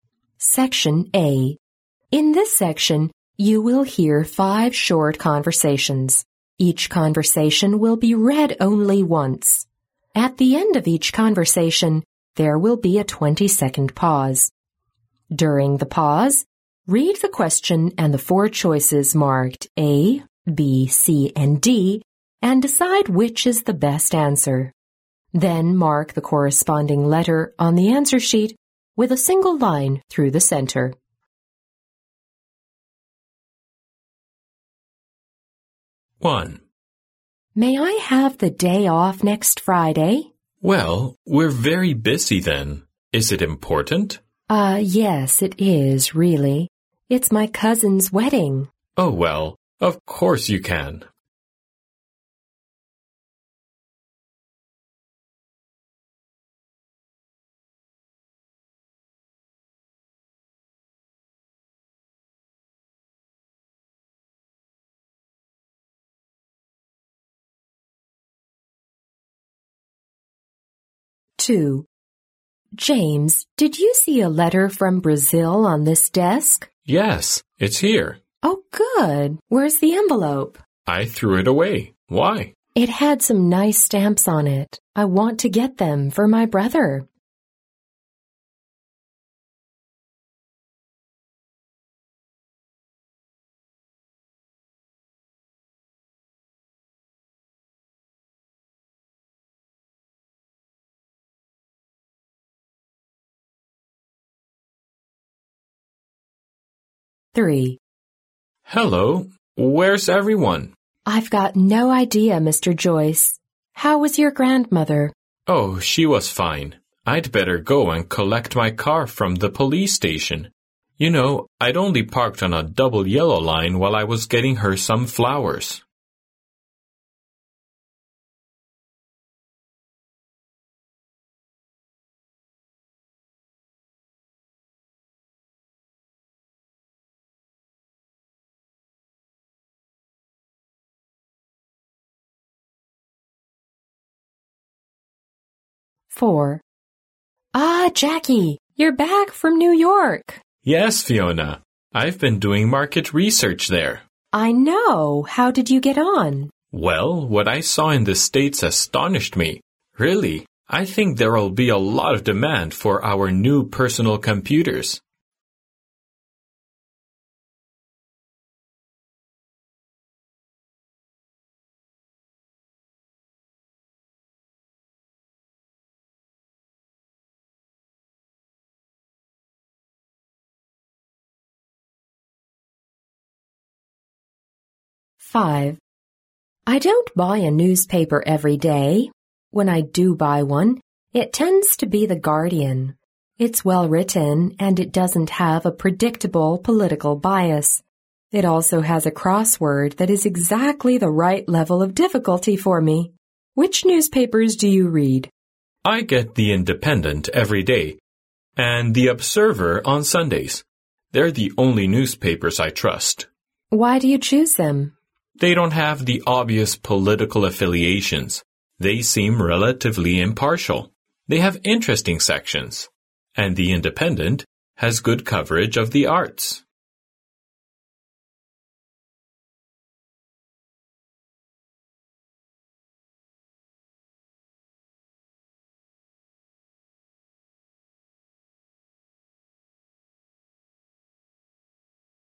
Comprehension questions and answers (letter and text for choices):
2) How did James deal with the envelope?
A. He sent it to his brother in Brazil.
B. He gave it to his brother.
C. He threw it away.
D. He put it under the desk.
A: C. He threw it away.

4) Why has Jacky been to New York?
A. To do market research.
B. To have a weekend trip.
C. To open a computer market.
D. To buy a personal computer.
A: A. To do market research.

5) Why does the woman choose to buy The Guardian ?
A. It carries a word game she likes.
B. Its political views are similar to hers.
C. Its arts section is interesting to read.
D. It has fewer advertisements.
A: A. It carries a word game she likes.

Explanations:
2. 录音中女士问詹姆斯有没有看见桌上一封来自巴西的信。男士说,他看见了。女士问男士,信封在哪里。男士回答说,"I threw it away(我把它扔掉了)"。因此,詹姆斯把信封扔掉了,C为正确选项。
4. 录音中菲奥娜对杰克说,"你从纽约回来了。"杰克回答说,"I've been doing market research there."由此可知,杰克去纽约是为了做市场调查,因此A为正确选项。